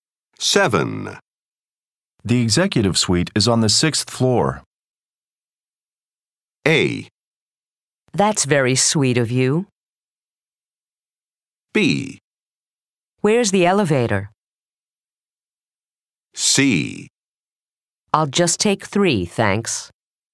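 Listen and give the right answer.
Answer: B: Where's the elevator?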